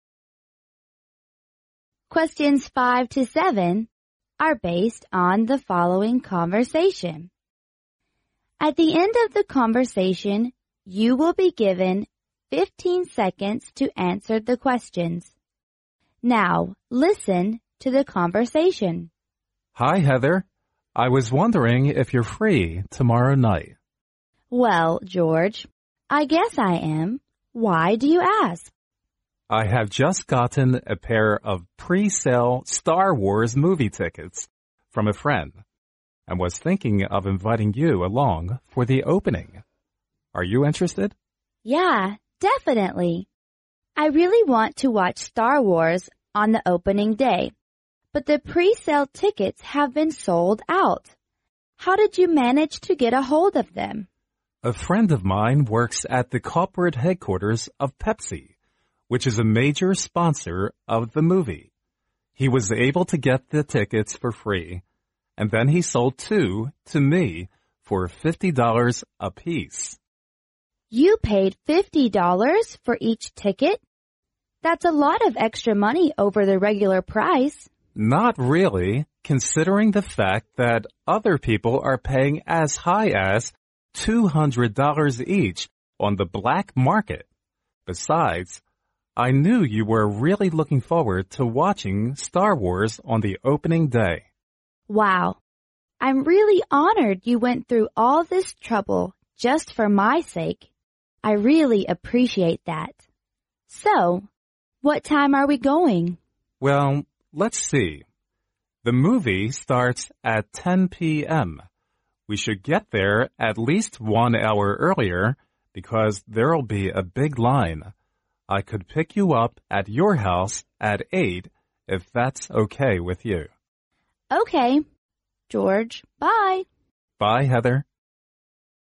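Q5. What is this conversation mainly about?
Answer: The man invites the woman for the opening premiere tomorrow.

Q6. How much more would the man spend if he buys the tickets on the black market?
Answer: 300 dollars.

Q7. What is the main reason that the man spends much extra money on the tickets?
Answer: The woman wants to watch the movie opening very much.

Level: 专业四级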